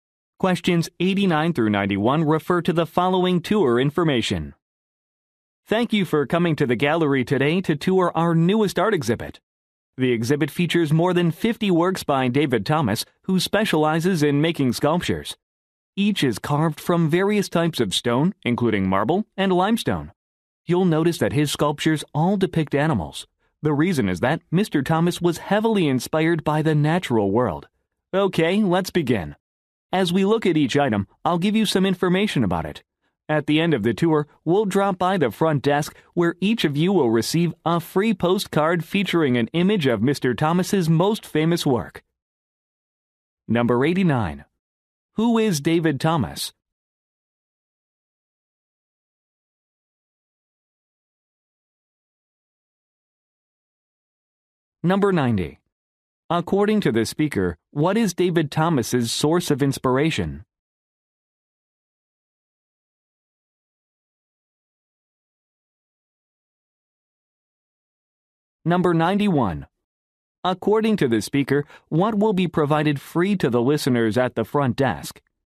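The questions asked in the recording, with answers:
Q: Who is David Thomas?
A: A sculptor

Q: According to the speaker, what is David Thomas's source of inspiration?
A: The natural world

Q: According to the speaker, what will be provided free to the listeners at the front desk?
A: A postcard of Mr. Thomas's most famous work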